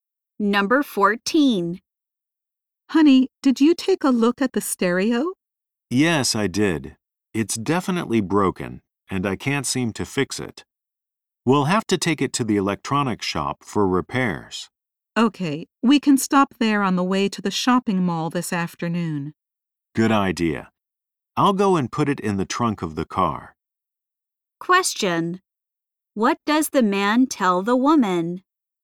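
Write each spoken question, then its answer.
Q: What does the man tell the woman?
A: The stereo is broken and must be taken to the electronics shop for repairs.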